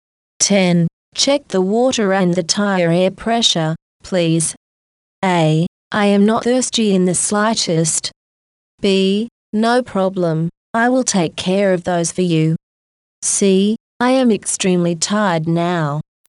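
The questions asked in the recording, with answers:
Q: Check the water and the tire air pressure, please.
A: B: No problem, I will take care of those for you.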